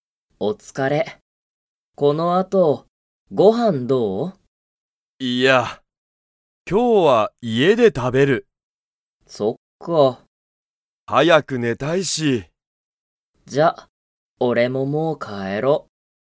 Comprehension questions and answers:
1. タケルとケイタは、この後一緒あといっしょにご飯はんを食たべますか?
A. はい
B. いいえ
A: B. いいえ

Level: Level 1

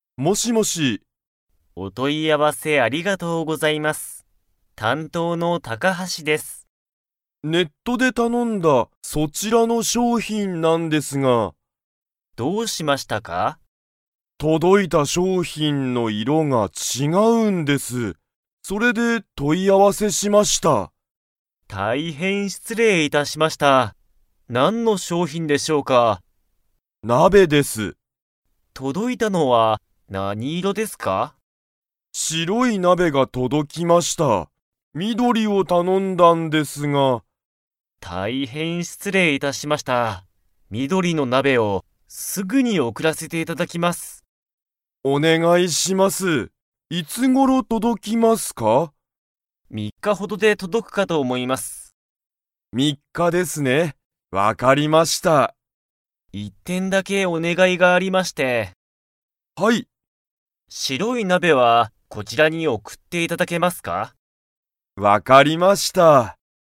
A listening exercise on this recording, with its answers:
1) 届とどいた商品しょうひんは、 。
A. 形かたちが違ちがう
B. 大おおきすぎる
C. 高たかすぎる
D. 色いろが違ちがう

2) 緑みどりの鍋なべは、明日あしたまでに届とどきますか?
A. はい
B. いいえ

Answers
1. D. 色いろが違ちがう
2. B. いいえ

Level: Level 4

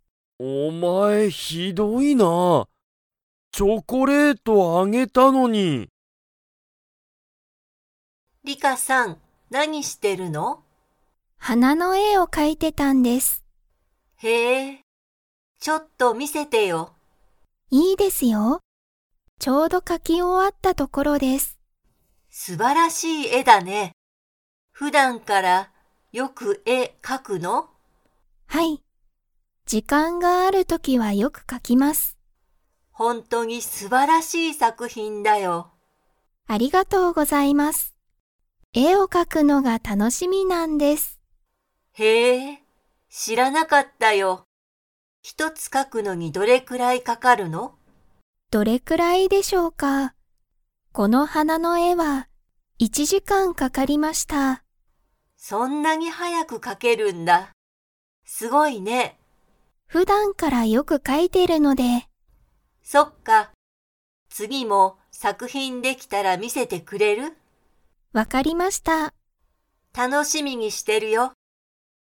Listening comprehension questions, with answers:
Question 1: リカは、普段(ふだん)からよく絵(え)を 。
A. 描(か)く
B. 描(か)かない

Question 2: リカは、花(はな)の絵(え)を描(か)くのにどのくらいかかりましたか?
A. 一日(いちにち)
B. 二日(ふつか)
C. 一時間(いちじかん)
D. 二時間(にじかん)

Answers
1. A. 描(か)く
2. C. 一時間(いちじかん)

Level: Level 3

